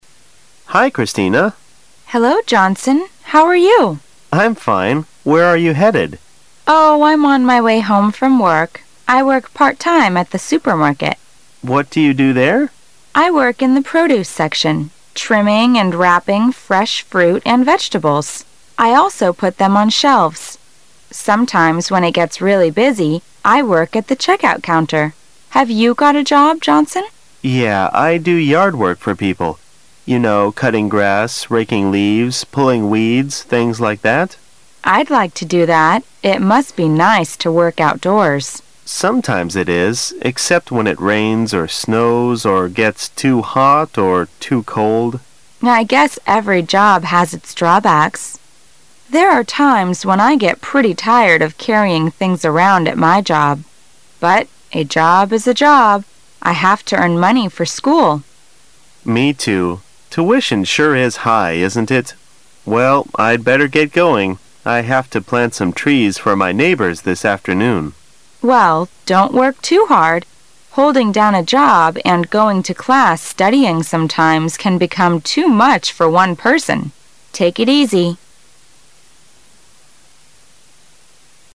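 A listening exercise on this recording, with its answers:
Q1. Where was Christina going when Johnson met her?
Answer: To her home.

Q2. What does Christina do at her supermarket job?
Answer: She puts groceries out on the shelves.

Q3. Why does Johnson do yard work?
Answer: To earn money for school.

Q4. What is Johnson going to do?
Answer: Plant trees.

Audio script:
[解析] 14-17 M: Hi Christina! W: Hello, Johnson, how are 8 you? M: I'm fine. Where are you headed? W: Oh, I' m on my way home from work. I work part-time at the supermarket. M: What do you do there? W: I work in the produce section, trimming and wrapping fresh fruit and vegetables. I also put them on shelves. Sometimes when it gets really busy, I work at the check-out counter. Have you got a job, Johnson? M: Yeah, I do yard work for people. You know, cutting grass, raking leaves, pulling weeds, things like that. W: I' d like to do that. 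It must be nice to work outdoors. M: Sometimes it is, except when it rains, or snows or gets too hot or too cold. W: I guess every job has its drawbacks. There are times when I get pretty tired of carrying things around at my job. But a job is a job. I have to earn money for school. M: Me too. Tuition sure is high, isn't it? Well, I'd better get going. I have to plant some trees for my neighbors this afternoon. W: Well, don' t work too hard. Holding down a job, and going to class studying sometimes can become too much for one person. Take it easy.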